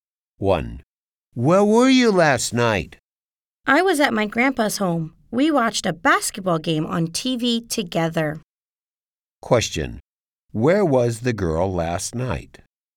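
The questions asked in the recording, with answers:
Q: Where was the girl last night?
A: At her grandpa's home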